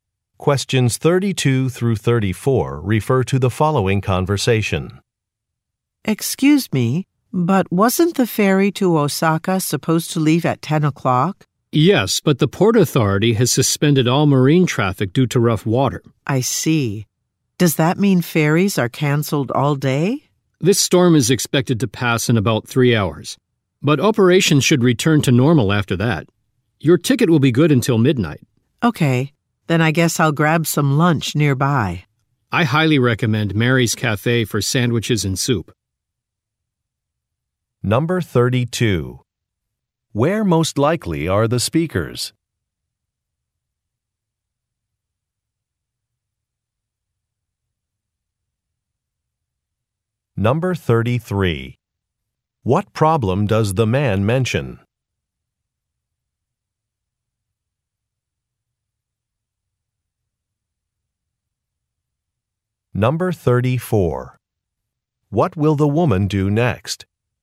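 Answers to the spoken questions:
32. At a ferry terminal
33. Ferries are suspended due to rough water from a storm
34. Get some lunch nearby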